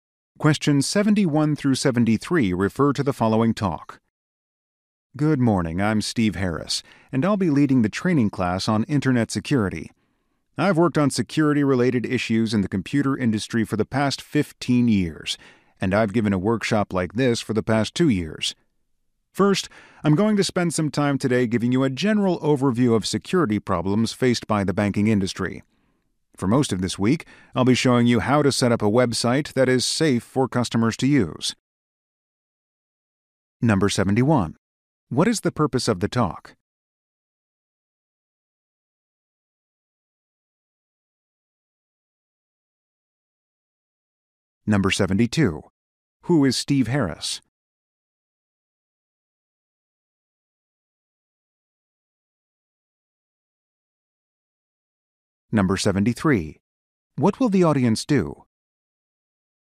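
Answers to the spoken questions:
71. To introduce a training class on Internet security
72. An Internet security expert leading the training
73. Learn how to set up a safe website for customers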